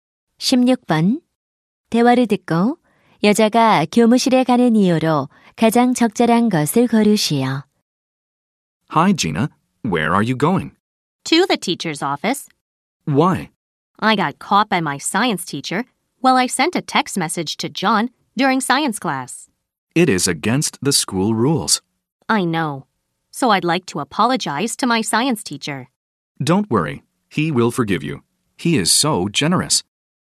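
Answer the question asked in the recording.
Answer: 과학 선생님께 사과하려고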